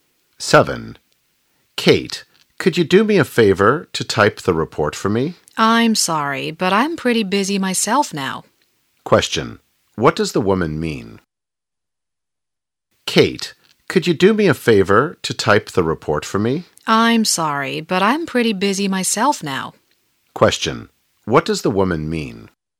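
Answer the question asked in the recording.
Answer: She is too busy to type the report for him.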